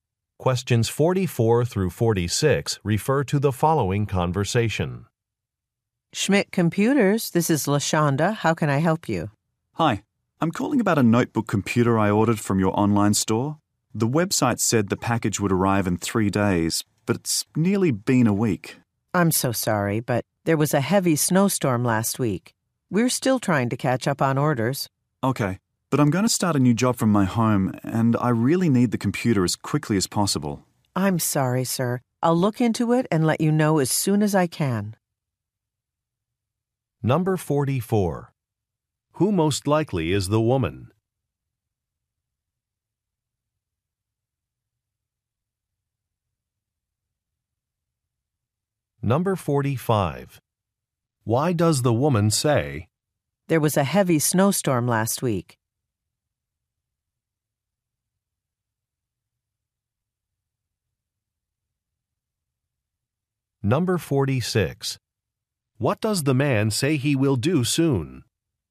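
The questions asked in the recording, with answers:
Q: Who most likely is the woman?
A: A customer service representative at a computer company

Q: Why does the woman say,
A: To explain a delivery delay

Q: What does the man say he will do soon?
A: Start a new job from home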